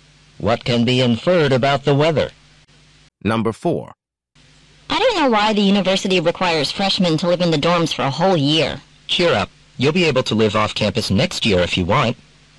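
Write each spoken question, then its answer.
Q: What can be inferred about the woman?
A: She is a freshman living in the dorms and does not like it.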